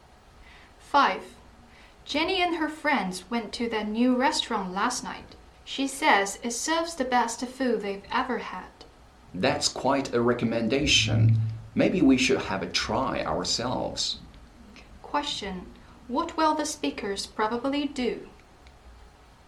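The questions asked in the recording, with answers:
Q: Question. What will the speakers probably do?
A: Try the new restaurant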